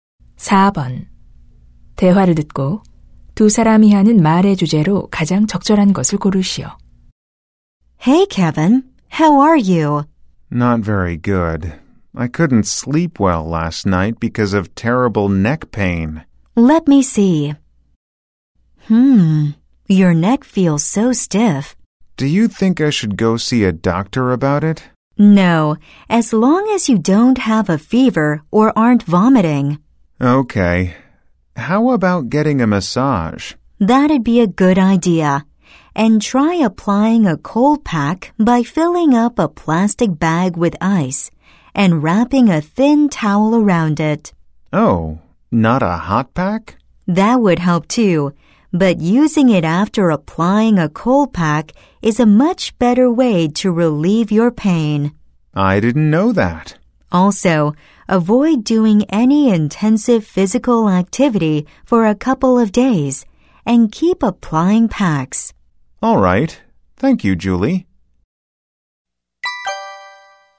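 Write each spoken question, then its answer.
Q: 대화를 듣고 두 사람이 하는 말의 주제로 가장 적절한 것을 고르시오.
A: 목 통증을 완화하는 방법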